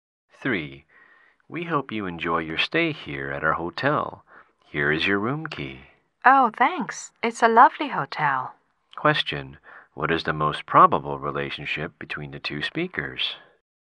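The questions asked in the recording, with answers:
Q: What is the most probable relationship between the two speakers?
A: Hotel clerk and guest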